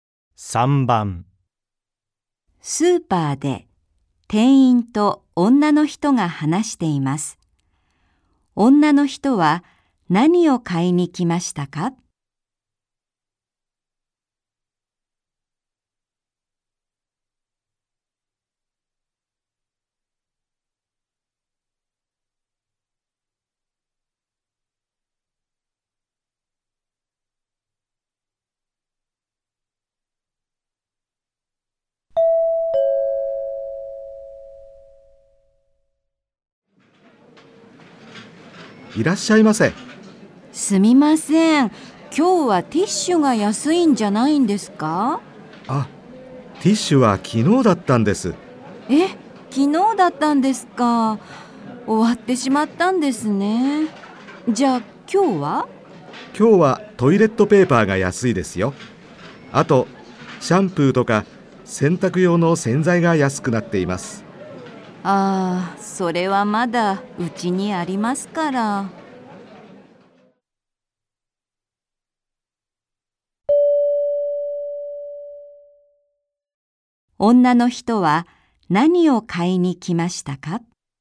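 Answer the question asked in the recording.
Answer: ティッシュ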